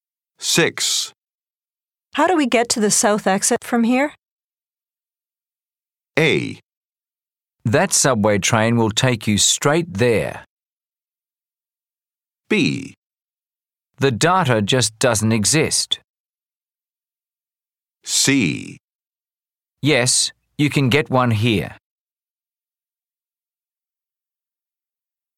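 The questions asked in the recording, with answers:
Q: How do we get to the south exit from here?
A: A: That subway train will take you straight there.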